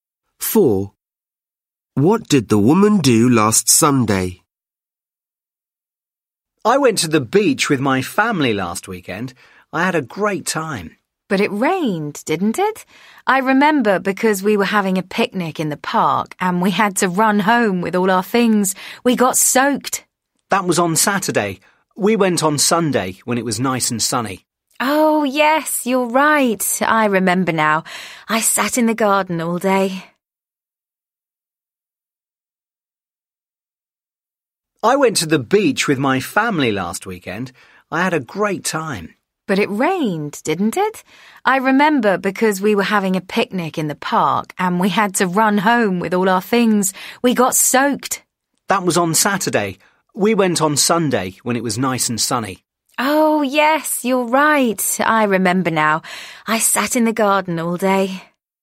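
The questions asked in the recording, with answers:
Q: What did the woman do last Sunday?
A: She went to the beach with her family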